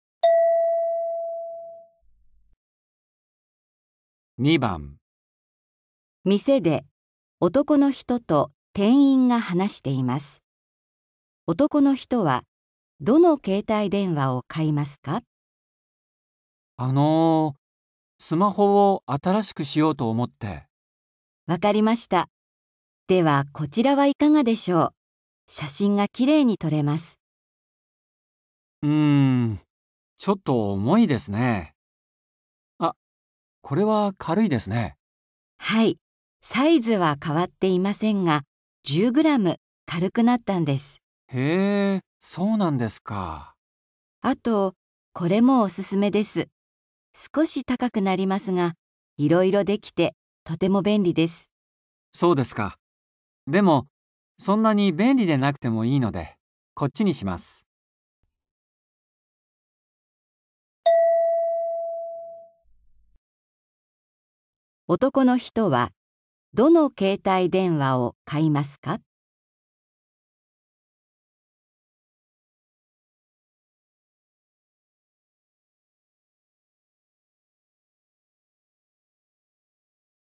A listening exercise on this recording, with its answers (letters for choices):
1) 店で、男の人と 店員が 話して います。男の人は どの 携帯電話を 買いますか。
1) 軽い けいたいでんわ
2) サイズが 大きい けいたいでんわ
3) いろいろ できる けいたいでんわ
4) 写真が きれいに とれる けいたいでんわ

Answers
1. 1

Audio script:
F:わかりました。では、こちらはいかがでしょう? 写真が きれいに 撮れます。
M:うーん、ちょっと 重いですね。あ、これは 軽いですね。
F:はい。サイズは 変わっていませんが、10グラム 軽く なったんです。
M:へえ、そうなんですか。
F:あと、これも おすすめです。少し 高くなりますが、いろいろ できて、とても 便利です。
M:そうですか。でも、そんなに 便利でなくても いいので、こっちに します。
男の人は どの 携帯電話を 買いますか。

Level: N4